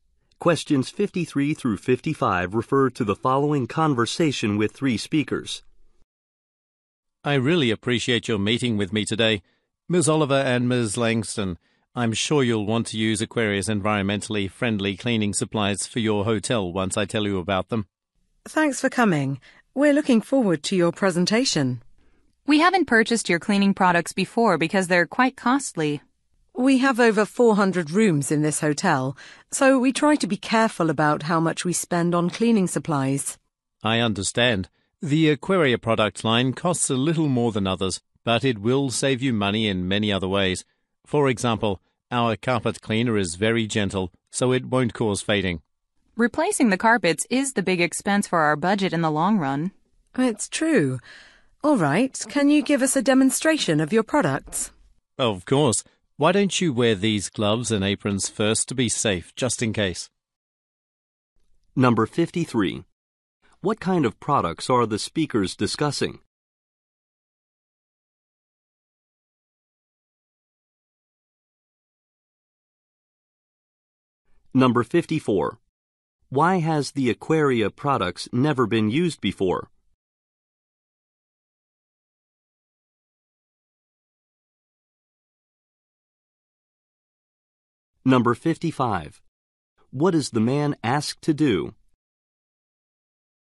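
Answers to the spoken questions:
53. Environmentally friendly cleaning supplies
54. They are too costly
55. Give a product demonstration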